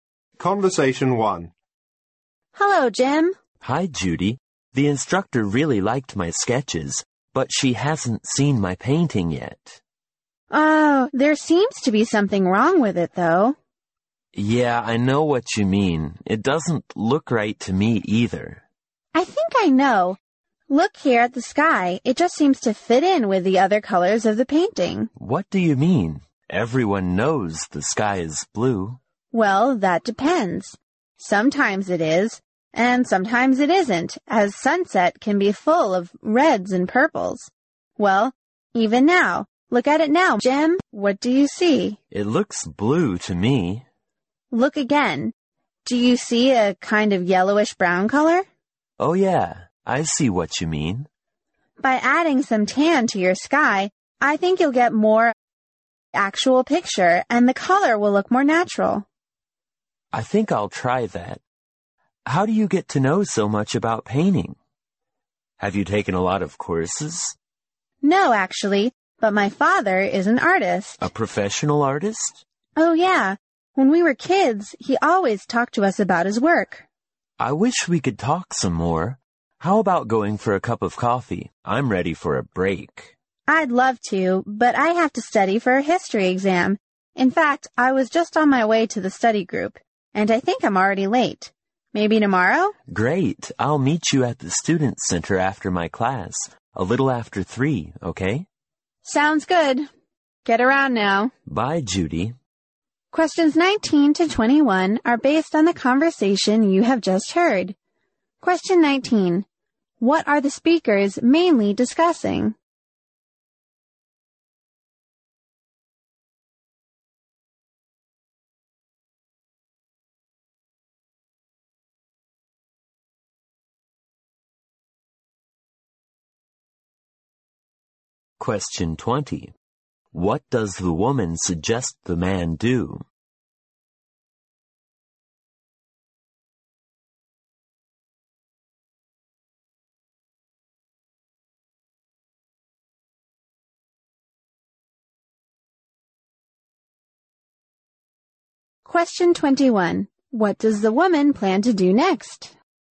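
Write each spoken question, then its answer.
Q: What are the speakers mainly discussing?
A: The man's painting

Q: What does the woman suggest the man do?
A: Add some tan to the sky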